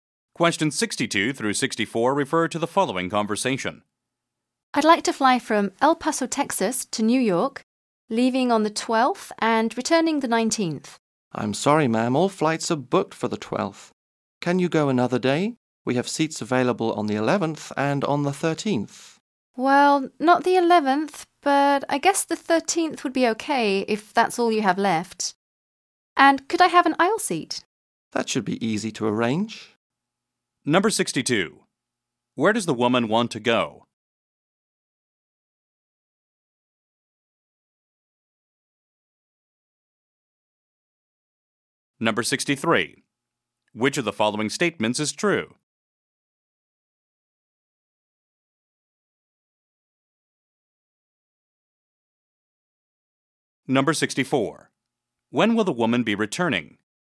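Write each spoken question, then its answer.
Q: Where does the woman want to go?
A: New York

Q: When will the woman be returning?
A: On the 19th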